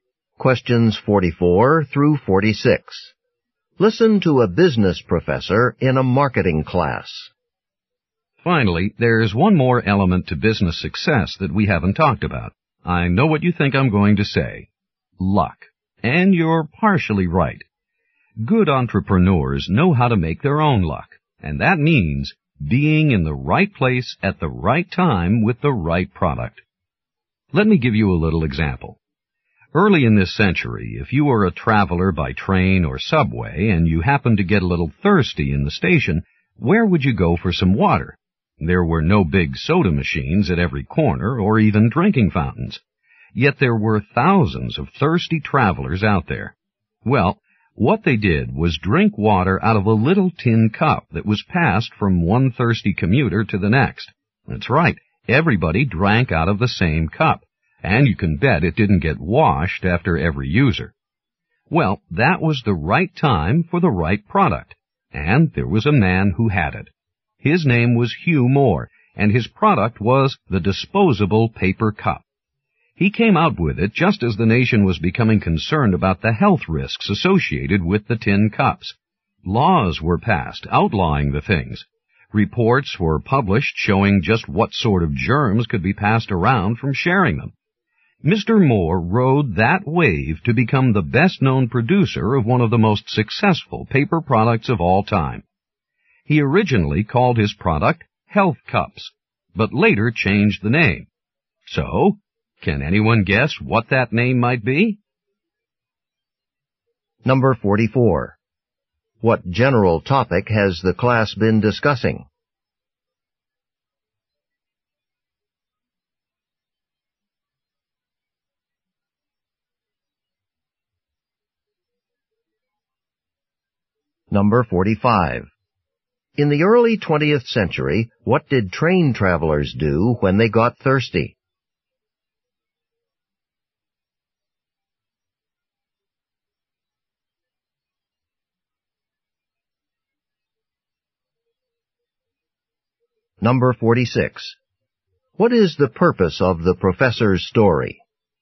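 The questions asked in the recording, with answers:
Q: What general topic has the class been discussing?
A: What makes a business successful.

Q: In the early 20th century, what did train travelers do when they got thirsty?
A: They drank from a shared tin cup.

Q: What is the purpose of the professor's story?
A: To show that success comes from having the right product at the right time.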